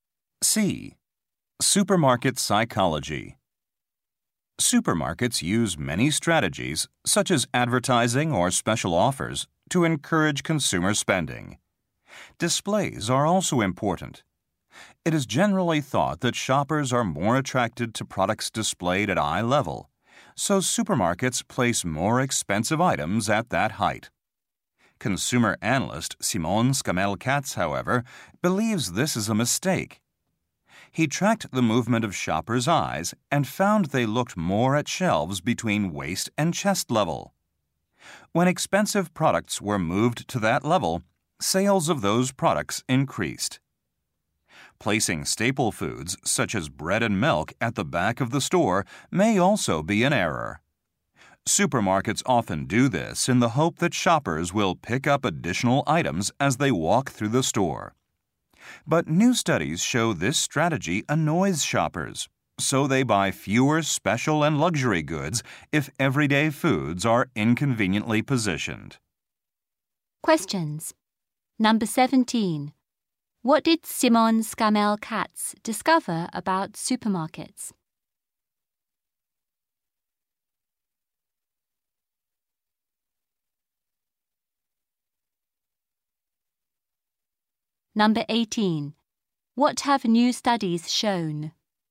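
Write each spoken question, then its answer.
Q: What did Simon Scammell-Katz discover about supermarkets?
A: Shoppers look most at shelves between waist and chest level

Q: What have new studies shown?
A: Putting staple foods at the back annoys shoppers, who then buy fewer luxury goods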